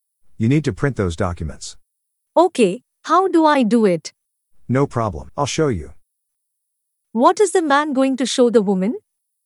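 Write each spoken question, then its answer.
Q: What is the man going to show the woman?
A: How to print the documents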